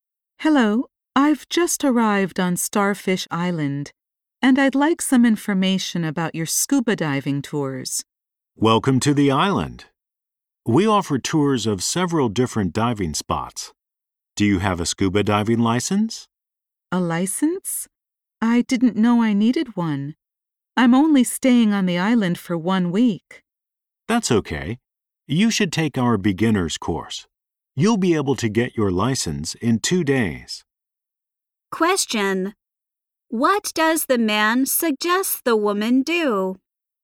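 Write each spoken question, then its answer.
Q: What does the man suggest the woman do?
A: Take a beginner's course to get a diving license.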